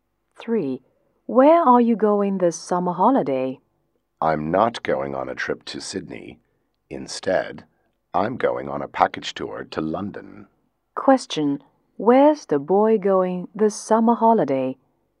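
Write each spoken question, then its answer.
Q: Question, where's the boy going this summer holiday?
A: London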